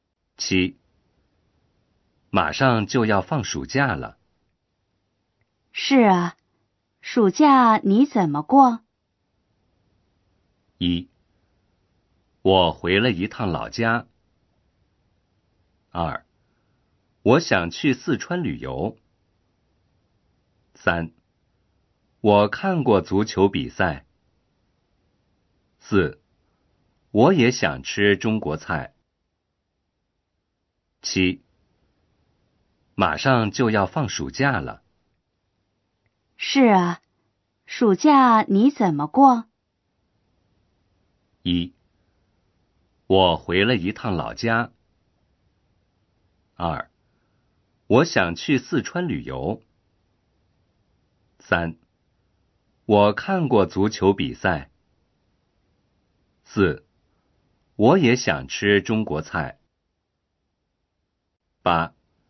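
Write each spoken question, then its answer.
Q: 暑假你怎么过?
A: 2: 我想去四川旅游。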